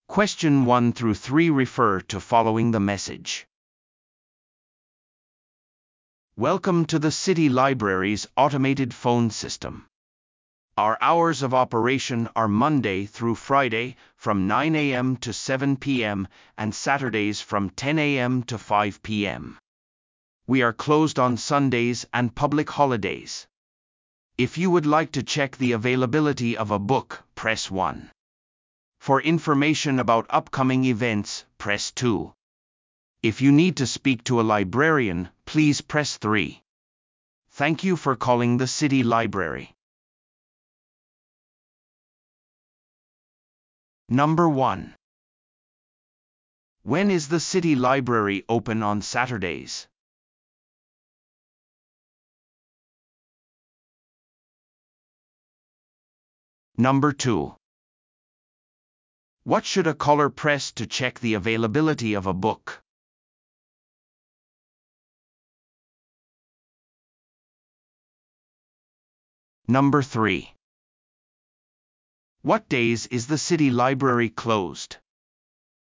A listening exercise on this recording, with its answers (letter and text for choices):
Listen to the audio below and answer the questions.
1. When is the City Library open on Saturdays?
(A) 午前8時から午後5時まで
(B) 午前9時から午後7時まで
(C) 午前10時から午後5時まで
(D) 午前9時から午後6時まで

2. What should a caller press to check the availability of a book?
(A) 0を押す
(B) 1を押す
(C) 2を押す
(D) 3を押す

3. What days is the City Library closed?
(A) 月曜日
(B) 土曜日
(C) 日曜日と祝日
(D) 平日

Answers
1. (C) 午前10時から午後5時まで
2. (B) 1を押す
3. (C) 日曜日と祝日